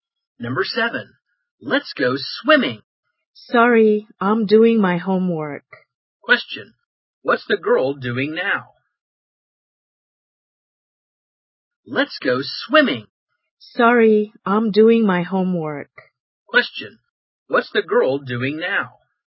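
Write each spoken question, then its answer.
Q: what's the girl doing now?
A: Doing her homework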